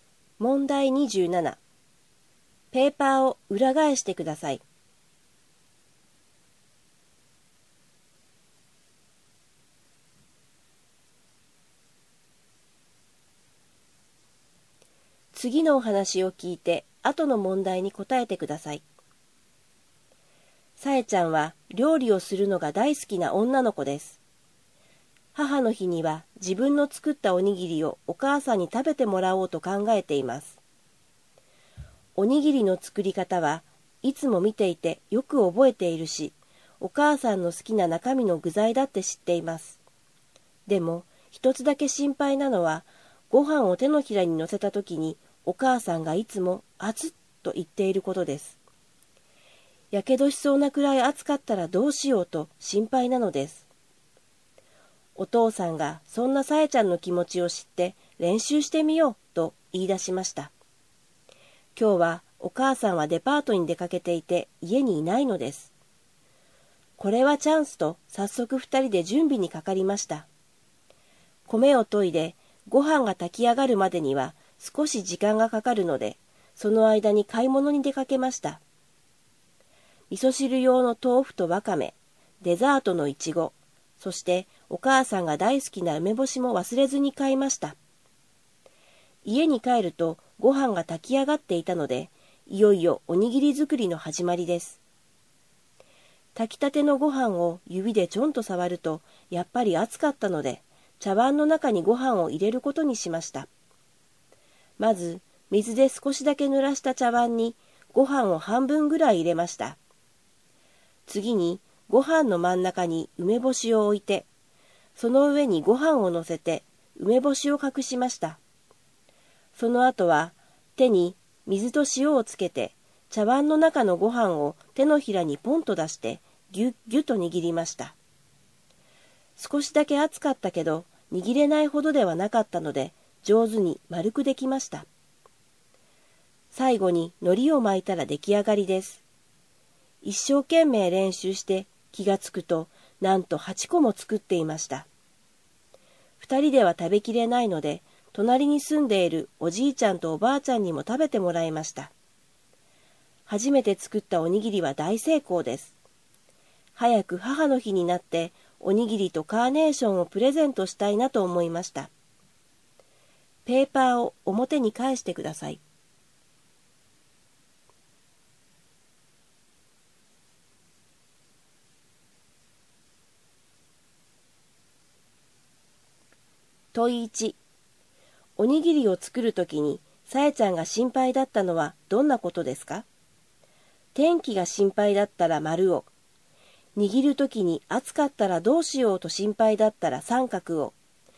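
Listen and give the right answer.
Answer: 三角: 握るときに暑かったらどうしようと心配だった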